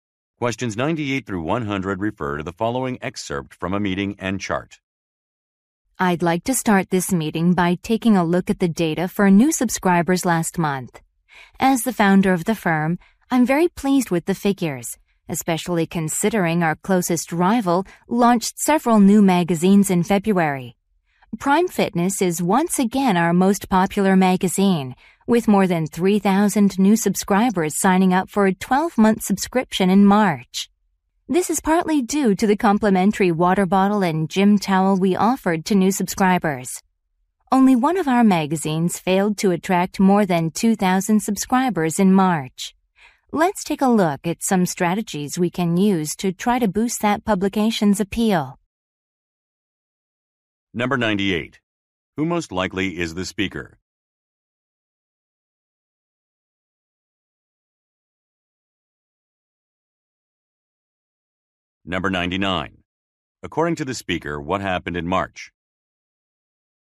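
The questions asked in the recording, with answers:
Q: Who most likely is the speaker?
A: The founder of a magazine publisher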